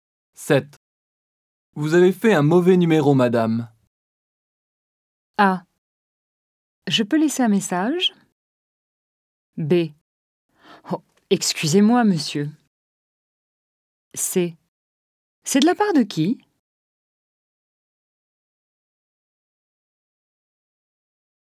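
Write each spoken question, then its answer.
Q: Vous avez fait un mauvais numéro, madame.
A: B: Oh, excusez-moi, monsieur.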